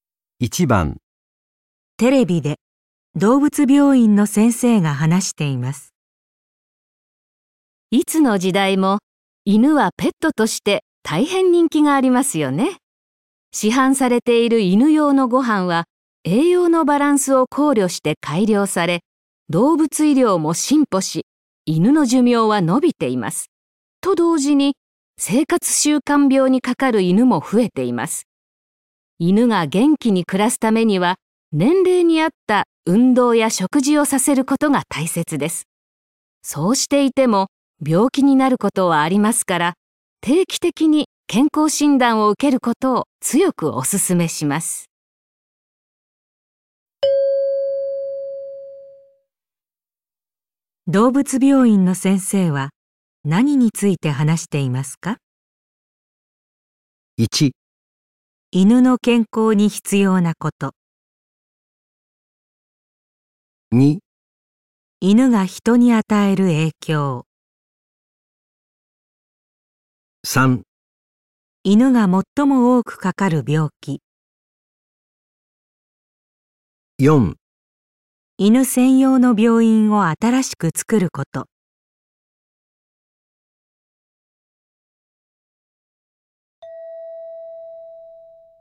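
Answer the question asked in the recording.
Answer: 1: 犬の健康に必要なこと。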